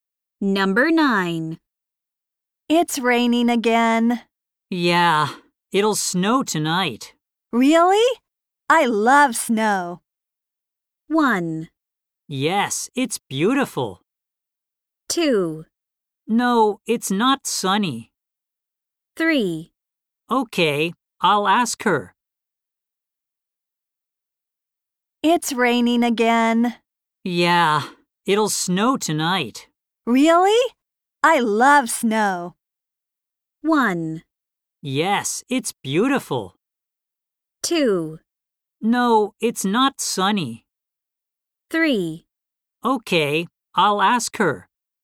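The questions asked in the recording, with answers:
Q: Really? I love snow.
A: 1: Yes, it's beautiful.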